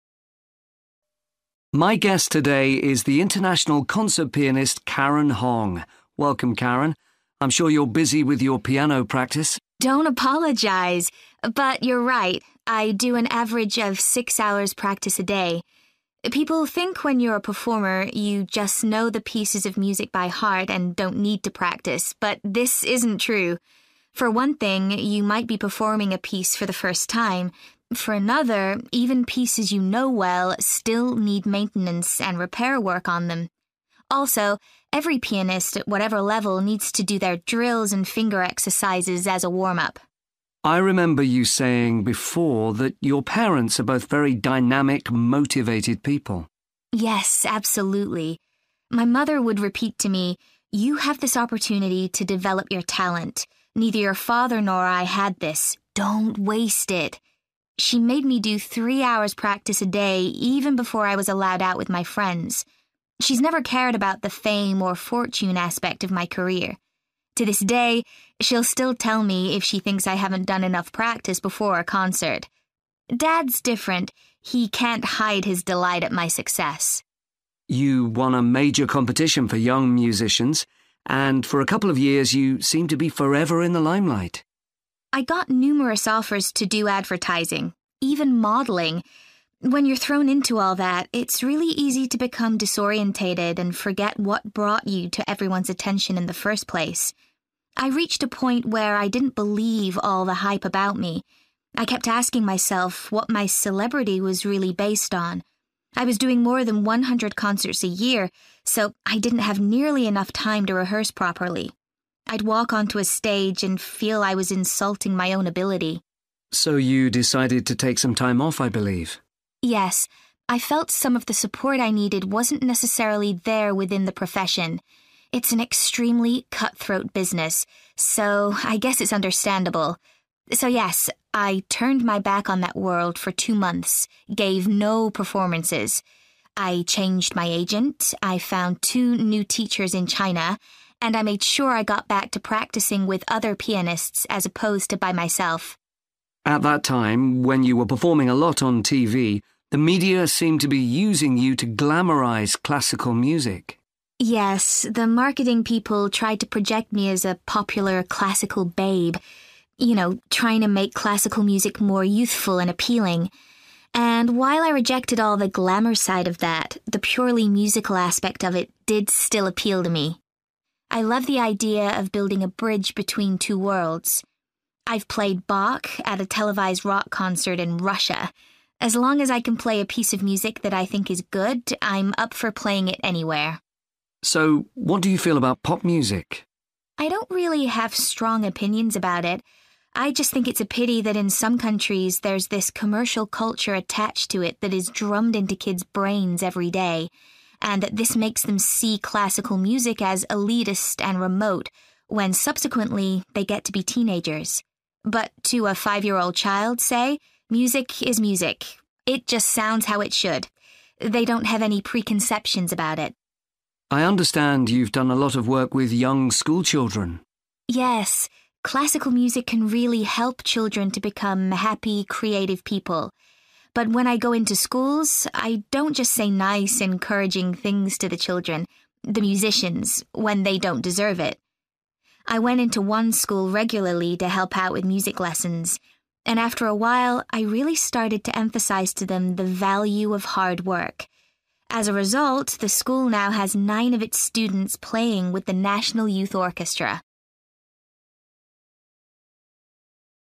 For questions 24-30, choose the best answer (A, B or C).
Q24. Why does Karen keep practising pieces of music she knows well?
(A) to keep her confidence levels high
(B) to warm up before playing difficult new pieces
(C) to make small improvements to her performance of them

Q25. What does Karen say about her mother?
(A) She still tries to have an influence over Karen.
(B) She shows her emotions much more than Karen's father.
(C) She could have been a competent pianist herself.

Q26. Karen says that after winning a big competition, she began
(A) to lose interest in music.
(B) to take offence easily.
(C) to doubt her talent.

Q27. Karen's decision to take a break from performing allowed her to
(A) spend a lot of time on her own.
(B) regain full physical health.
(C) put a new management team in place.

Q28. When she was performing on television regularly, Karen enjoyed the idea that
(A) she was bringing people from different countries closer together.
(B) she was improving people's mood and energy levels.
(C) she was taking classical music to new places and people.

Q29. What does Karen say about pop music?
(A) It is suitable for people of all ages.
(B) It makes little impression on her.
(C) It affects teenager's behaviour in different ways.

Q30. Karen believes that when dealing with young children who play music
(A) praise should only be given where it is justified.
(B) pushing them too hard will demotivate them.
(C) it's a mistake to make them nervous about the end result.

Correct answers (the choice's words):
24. to make small improvements to her performance of them
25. She still tries to have an influence over Karen.
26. to doubt her talent.
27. put a new management team in place.
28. she was taking classical music to new places and people.
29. It makes little impression on her.
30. praise should only be given where it is justified.

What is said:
Interviewer: My guest today is the international concert pianist, Karen Hong. Welcome Karen. I'm sure you're busy with your piano practice!
But you're right – I do an average of six hours' practice a day. People think when you're a performer, you just know the pieces of music by heart and don't need to practise, but this isn't true! For one thing, you might be performing a piece for the first time. For another, even pieces you know well still need maintenance and repair work on them. Also, every pianist at whatever level needs to do their drills and finger exercises as a warm-up.
Interviewer: I remember you saying before that your parents are both very dynamic, motivated people.
Karen: Yes absolutely. My mother would repeat to me 'You have this opportunity to develop your talent. Neither your father nor I had this. Don't waste it.' She made me do three hours' practise a day even before I was allowed out with my friends. She's never cared about the fame or fortune aspect of my career. To this day, she'll still tell me if she thinks I haven't done enough practice before a concert. Dad's different – he can't hide his delight at my success.
Interviewer: You won a major competition for young musicians, and for a couple of years you seemed to be forever in the limelight.
Karen: I got numerous offers to do advertising ... When you're thrown into all that, it's really easy to become disorientated and forget what brought you to everyone's attention in the first place. I reached a point where I didn't believe all the hype about me. I kept asking myself what my celebrity was really based on. I was doing more than 100 concerts a year so I didn't have nearly enough time to rehearse properly. I'd walk onto a stage and feel I was insulting my own ability.
Interviewer: So you decided to take some time off, I believe?
Karen: Yes, I felt some of the support I needed wasn't necessarily there within the profession. It's an extremely cut-throat business, so I guess it's understandable. So yes, I turned my back on that world for two months – gave no performances. I changed my agent, I found two new teachers in China, and I made sure I got back to practising with other pianists as opposed to by myself.
Interviewer: At the time when you were performing a lot on TV, the media seemed to be using you to glamorise classical music.
Karen: Yes the marketing people tried to project me as a popular classical babe ... you know trying to make classical music more youthful and appealing. And while I rejected all the glamour side of that, the purely musical aspect of it did still appeal to me. I love the idea of building a bridge between two worlds. I've played Bach at a televised rock concert in Russia! As long as I can play a piece of music that I think is good, I'm up for playing it anywhere.
Interviewer: So what do you feel about pop music?
Karen: I don't really have strong opinions about it – I just think it's a pity that in some countries there's this commercial culture attached to it that is drummed into kids' brains every day, and that this makes them see classical music as elitist and remote when subsequently they get to be teenagers. But to a five-year-old child, say, music is music. It just sounds how it should. They don't have any preconceptions about it.
Interviewer: I understand you've done a lot of work with young school children.
Karen: Yes, classical music can really help children to become happy, creative people. But when I go into schools I don't just say nice encouraging things to the children ... the musicians ... when they don't deserve it. I went into one school regularly to help out with music lessons. And after a while I really started to emphasise to them the value of hard work. As a result the school now has nine of its students playing with the National Youth Orchestra.